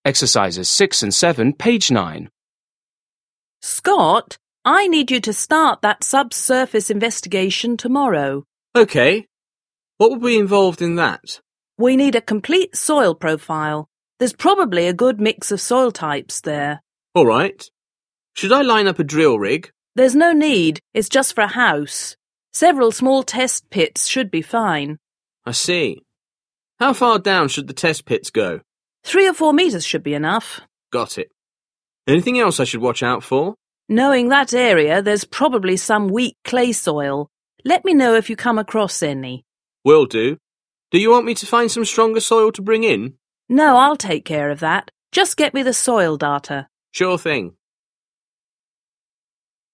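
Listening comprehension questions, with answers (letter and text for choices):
6. Listen to a conversation between a contractor and an employee. Choose the correct answers.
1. What is the conversation mainly about?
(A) why a drill rig is necessary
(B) When clay soil might be dangerous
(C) How to increase the strength of soil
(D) What to do for a subsurface investigation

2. What will the woman do?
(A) dig test pits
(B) arrange a drill rig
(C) obtain a soil profile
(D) order stronger soil if needed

7. Listen again and complete the conversation.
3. Contractor: Scott, 1 (________) (________) (________) to start that subsurface investigation tomorrow.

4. Contractor: We need a 2 (________) (________) (________) There's probably a good mix of soil types there.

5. Employee: All right. 3 (________) (_______) (_______) (_______) a drill rig?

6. Contractor: 4 (________) (________) (________). 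It's just for a house.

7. Employee: I see. 5 (________) (________) (________) should the test pits go?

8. Contractor: Three or four meters 6 (________) (________) (________).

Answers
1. (D) What to do for a subsurface investigation
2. (A) dig test pits
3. I need you
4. complete soil profile
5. Should I line up
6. There's no need
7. How far down
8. should be enough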